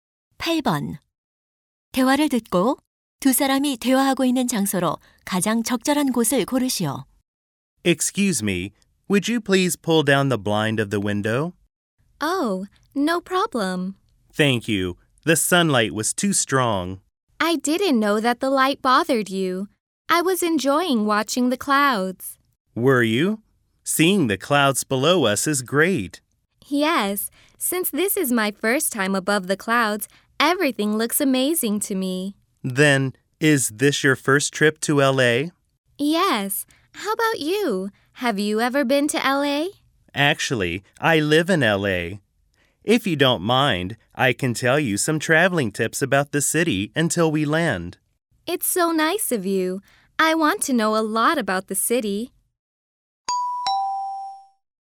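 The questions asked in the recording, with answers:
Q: 대화를 듣고 두 사람이 대화하고 있는 장소로 가장 적절한 곳을 고르시오.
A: 비행기 안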